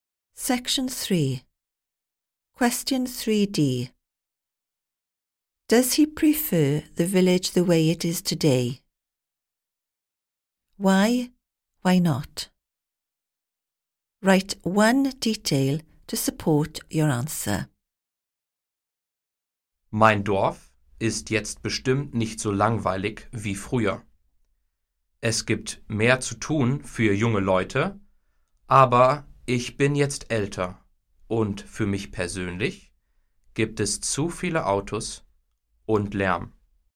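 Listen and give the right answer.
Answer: No: too many cars and too much noise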